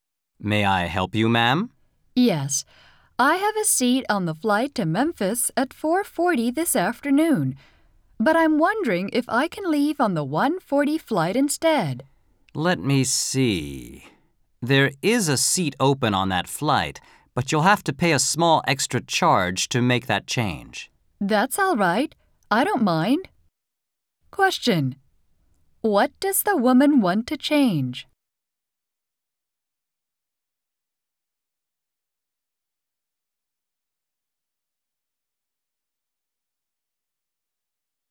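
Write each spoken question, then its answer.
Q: What does the woman want to change?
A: Her flight, to the earlier 1:40 flight instead of the 4:40 one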